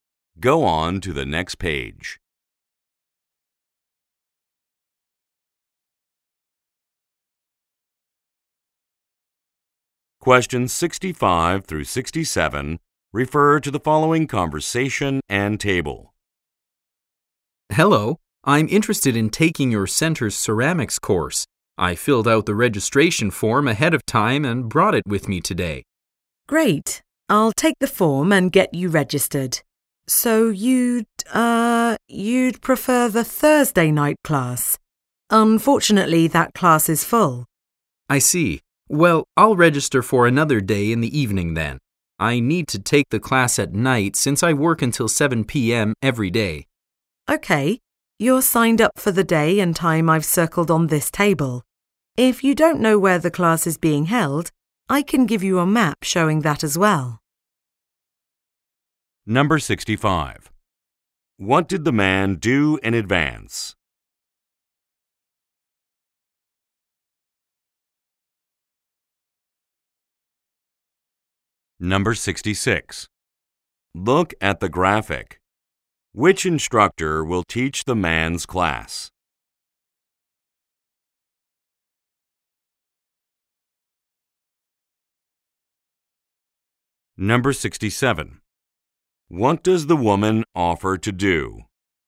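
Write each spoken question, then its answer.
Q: What did the man do in advance?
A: Filled out the registration form

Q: What does the woman offer to do?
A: Give him a map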